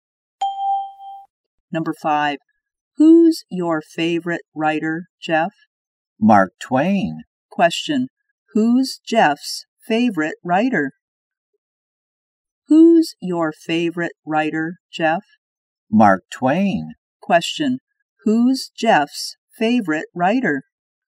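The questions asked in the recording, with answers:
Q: Question, who's Jeff's favorite writer?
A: Mark Twain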